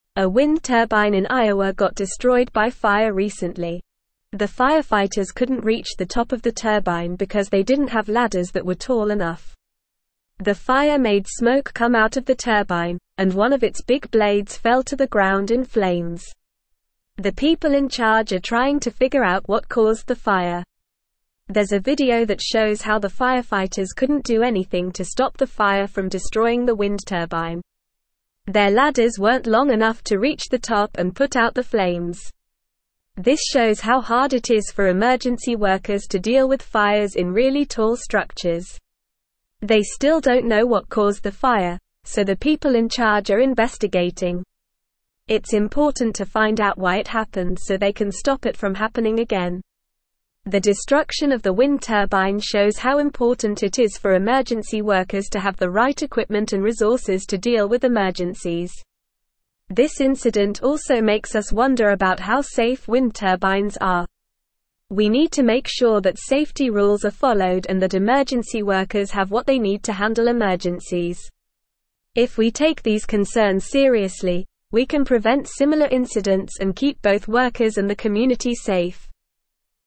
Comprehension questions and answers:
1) The firefighters couldn't reach the top of the turbine because they didn't have (1)______ that were tall enough.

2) The (2)______ in (3)______ are (4)______ to figure out what caused the fire.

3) The (2)______ in (3)______ are (4)______ to figure out what caused the fire.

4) The (2)______ in (3)______ are (4)______ to figure out what caused the fire.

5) There's a video that (5)______ how the (6)______ couldn't do anything to stop the fire from (7)______ the wind turbine.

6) There's a video that (5)______ how the (6)______ couldn't do anything to stop the fire from (7)______ the wind turbine.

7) There's a video that (5)______ how the (6)______ couldn't do anything to stop the fire from (7)______ the wind turbine.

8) This shows how hard it is for (8)______ workers to deal with fires in really tall structures.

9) They still don't know what caused the fire, so the people in charge are (9)______.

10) It's (10)______ to find out why it happened so they can stop it from happening again.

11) The destruction of the wind turbine shows how important it is for emergency workers to have the right (11)______ and (12)______ to deal with emergencies.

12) The destruction of the wind turbine shows how important it is for emergency workers to have the right (11)______ and (12)______ to deal with emergencies.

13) This (13)______ also makes us (14)______ about how safe wind turbines are.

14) This (13)______ also makes us (14)______ about how safe wind turbines are.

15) We need to make sure that (15)______ rules are followed and that emergency workers have what they need to handle emergencies.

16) If we take these concerns seriously, we can prevent similar incidents and keep both workers and the (16)______ safe.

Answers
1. ladders
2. people
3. charge
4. trying
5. shows
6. firefighters
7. destroying
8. emergency
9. investigating
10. important
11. equipment
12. resources
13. incident
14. wonder
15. safety
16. community

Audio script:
A wind turbine in Iowa got destroyed by fire recently. The firefighters couldn't reach the top of the turbine because they didn't have ladders that were tall enough. The fire made smoke come out of the turbine, and one of its big blades fell to the ground in flames. The people in charge are trying to figure out what caused the fire.
There's a video that shows how the firefighters couldn't do anything to stop the fire from destroying the wind turbine. Their ladders weren't long enough to reach the top and put out the flames. This shows how hard it is for emergency workers to deal with fires in really tall structures.
They still don't know what caused the fire, so the people in charge are investigating. It's important to find out why it happened so they can stop it from happening again. The destruction of the wind turbine shows how important it is for emergency workers to have the right equipment and resources to deal with emergencies.
This incident also makes us wonder about how safe wind turbines are. We need to make sure that safety rules are followed and that emergency workers have what they need to handle emergencies. If we take these concerns seriously, we can prevent similar incidents and keep both workers and the community safe.

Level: Level 3